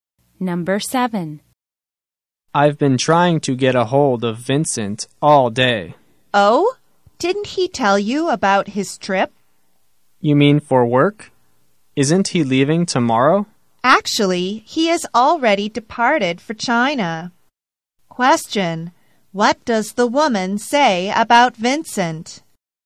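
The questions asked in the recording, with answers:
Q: Question: what does the woman say about Vincent?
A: He has already departed for China.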